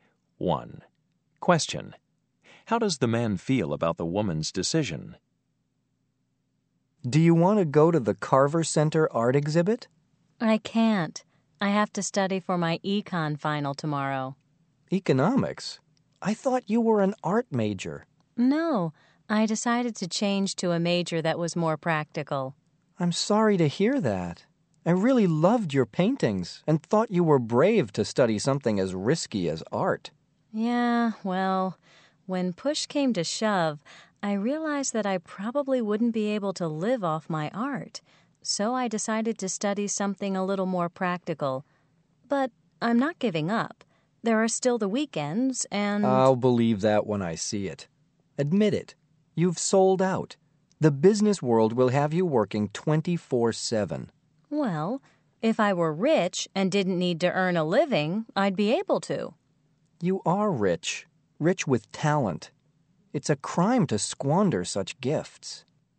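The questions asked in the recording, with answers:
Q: How does the man feel about the woman's decision?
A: He disapproves; he thinks she is wasting her artistic talent and has sold out.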